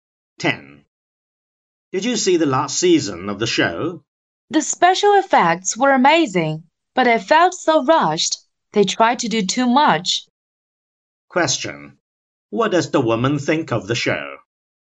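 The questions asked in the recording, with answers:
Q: What does the woman think of the show?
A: The special effects were amazing but it felt rushed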